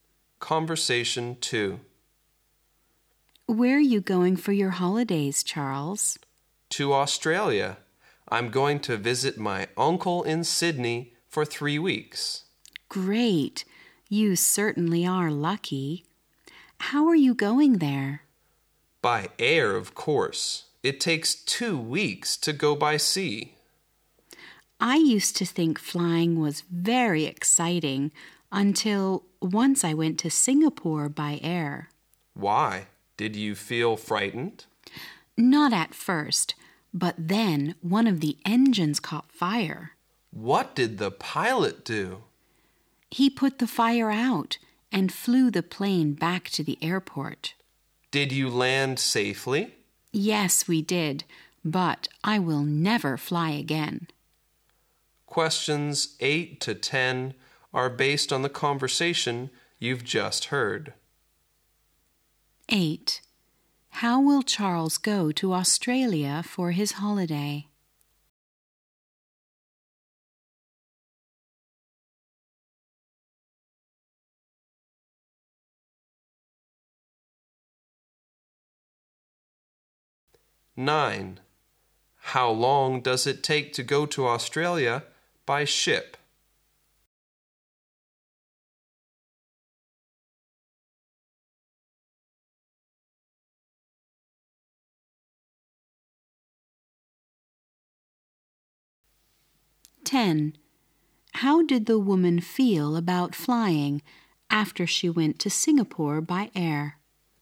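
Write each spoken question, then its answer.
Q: How will Charles go to Australia for his holiday?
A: By air

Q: How long does it take to go to Australia by ship?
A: Two weeks

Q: How did the woman feel about flying after she went to Singapore by air?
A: She would never fly again; she was afraid of flying.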